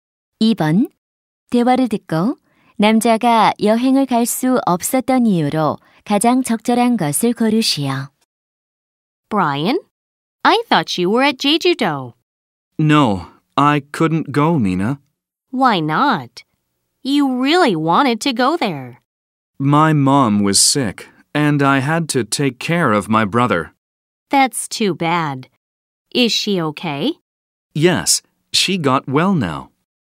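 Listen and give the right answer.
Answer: 엄마가 아파서 동생을 돌봐야 했기 때문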